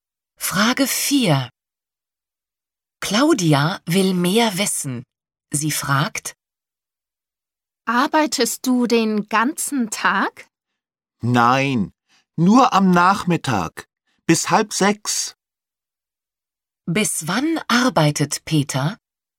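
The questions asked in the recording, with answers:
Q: Bis wann arbeitet Peter?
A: Bis 5:30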